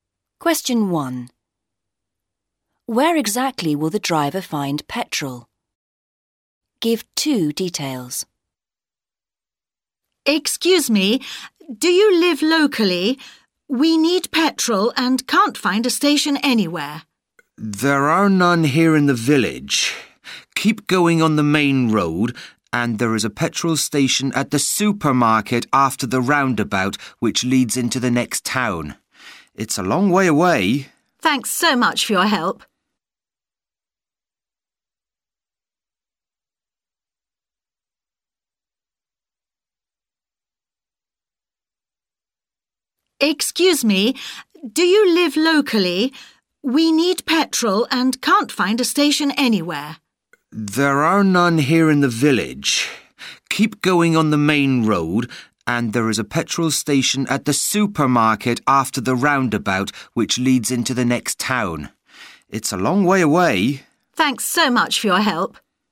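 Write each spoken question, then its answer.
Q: Where exactly will the driver find petrol?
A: At the supermarket after the roundabout, on the main road leading into the next town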